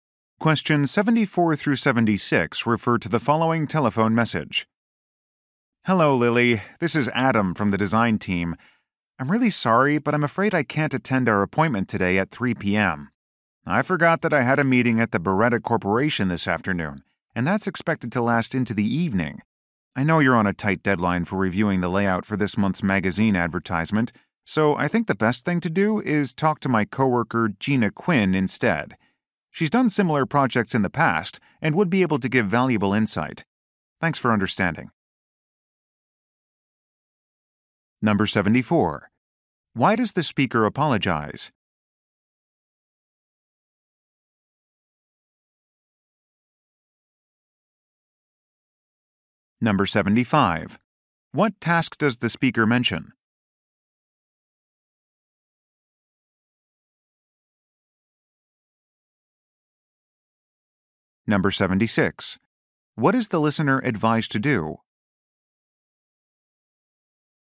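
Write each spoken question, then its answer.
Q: Why does the speaker apologize?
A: He can't attend their appointment

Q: What task does the speaker mention?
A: Reviewing a magazine advertisement layout

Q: What is the listener advised to do?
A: Talk to his coworker Gina Quinn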